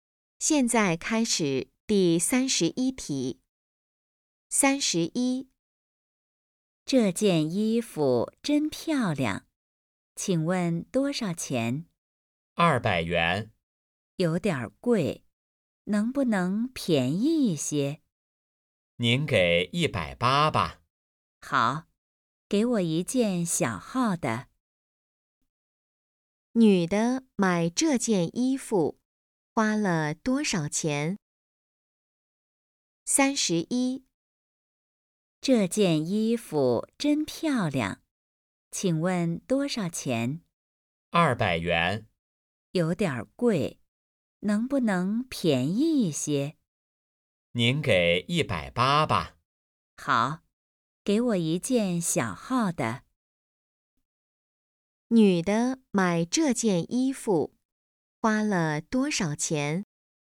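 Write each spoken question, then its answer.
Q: 女的买这件衣服花了多少钱?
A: 180元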